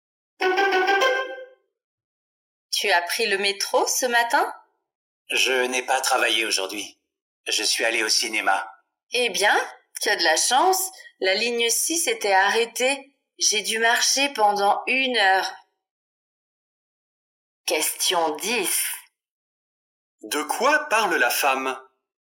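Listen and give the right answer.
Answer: La ligne 6 du métro était arrêtée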